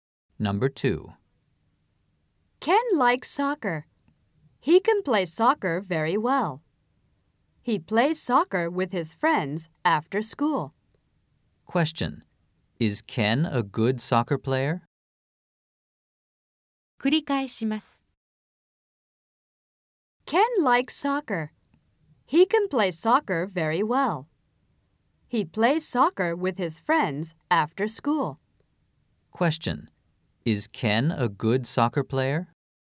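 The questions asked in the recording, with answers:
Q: Is Ken a good soccer player?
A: Yes, he is.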